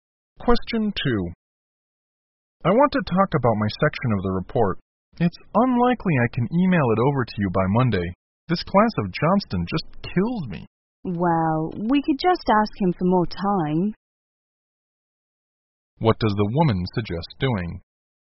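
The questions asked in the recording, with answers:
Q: What does the woman suggest doing?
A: Ask Johnston for more time.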